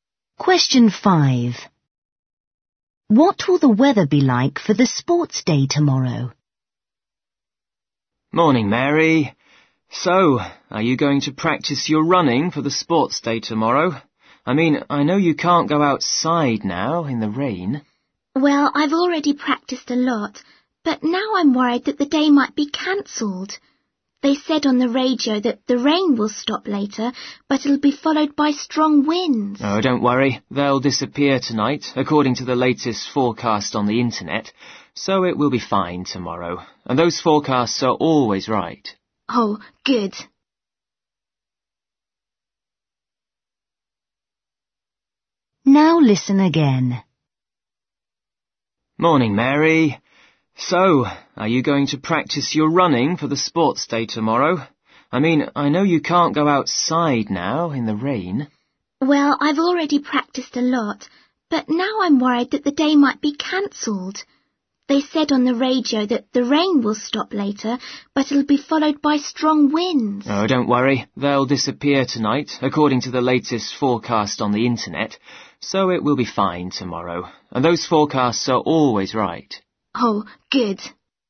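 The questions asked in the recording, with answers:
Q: What will the weather be like for the sports day tomorrow?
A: fine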